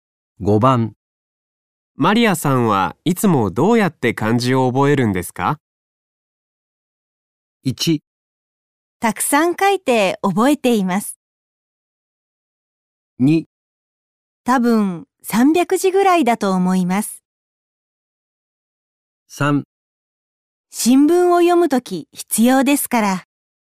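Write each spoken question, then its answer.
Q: マリアさんはいつもどうやって漢字を覚えるんですか?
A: 1: たくさん書いて覚えています。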